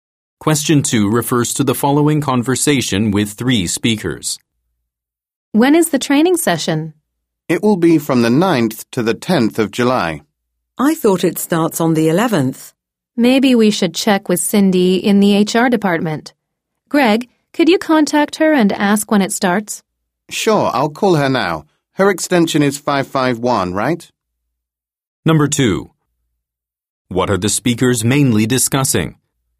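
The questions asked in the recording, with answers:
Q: What are the speakers mainly discussing?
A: When the training session starts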